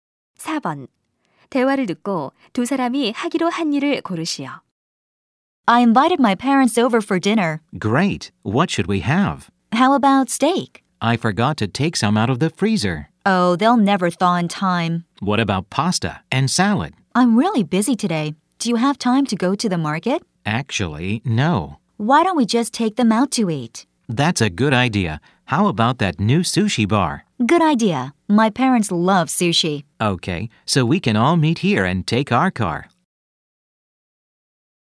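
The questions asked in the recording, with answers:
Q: 대화를 듣고 두 사람이 하기로 한 일을 고르시오.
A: 부모님과 새 초밥집에 외식하러 가기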